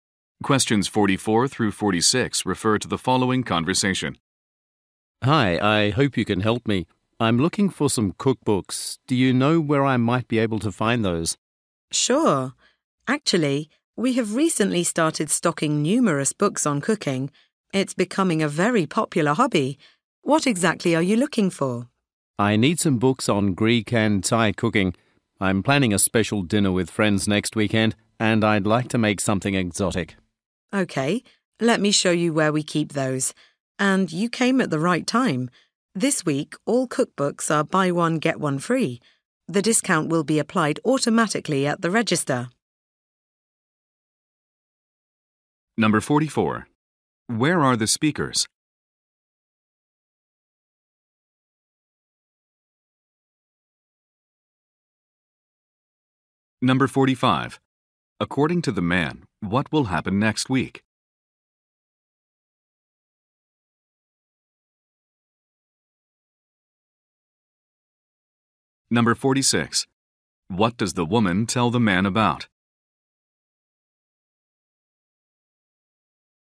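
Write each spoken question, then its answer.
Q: Where are the speakers?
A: In a bookstore.

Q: According to the man, what will happen next week?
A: He will host a special dinner with friends.

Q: What does the woman tell the man about?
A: A buy-one-get-one-free offer on cookbooks.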